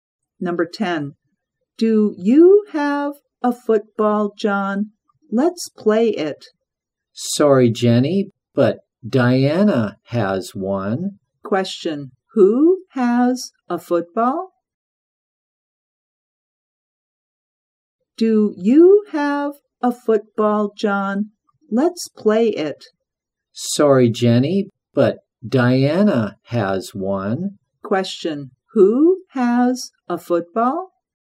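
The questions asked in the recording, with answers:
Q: Who has a football?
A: Diana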